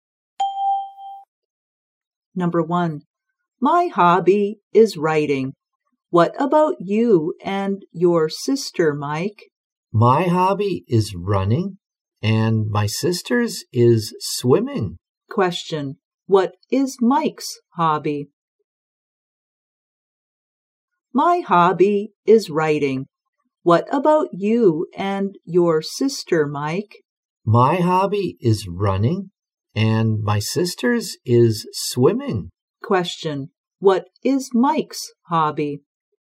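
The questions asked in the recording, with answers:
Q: what is Mike's hobby?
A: Running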